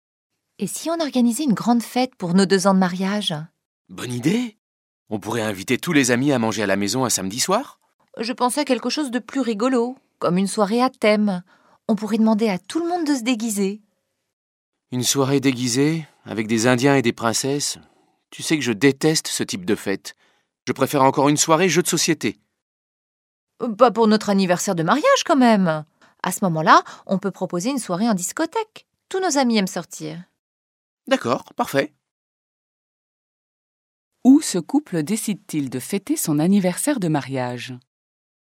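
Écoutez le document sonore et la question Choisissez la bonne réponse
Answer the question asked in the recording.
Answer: En discothèque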